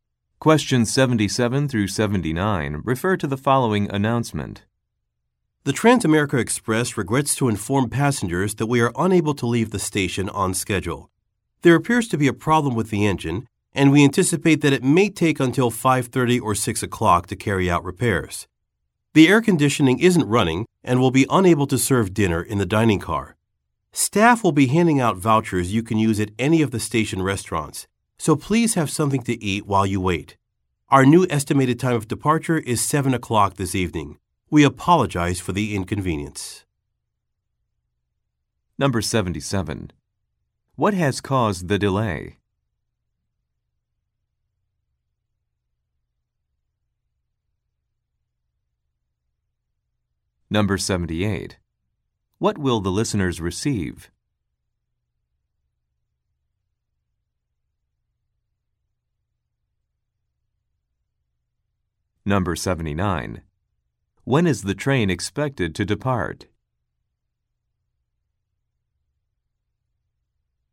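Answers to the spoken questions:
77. A problem with the engine
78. Meal vouchers for station restaurants
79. At 7 o'clock this evening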